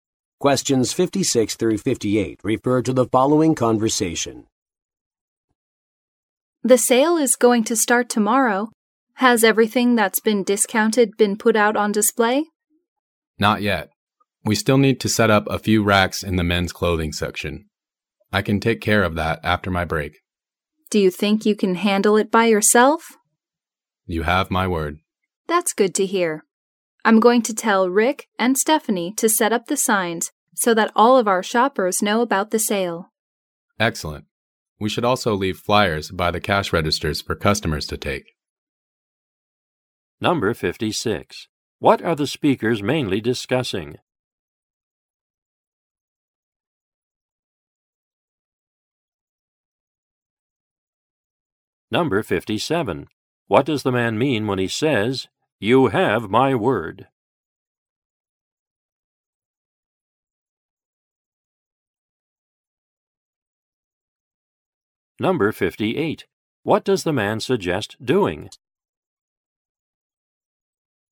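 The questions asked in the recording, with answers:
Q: What are the speakers mainly discussing?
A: Getting ready for a sale

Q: What does the man mean when he says, "You have my word"?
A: He can set up the racks by himself

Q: What does the man suggest doing?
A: Leaving flyers by the cash registers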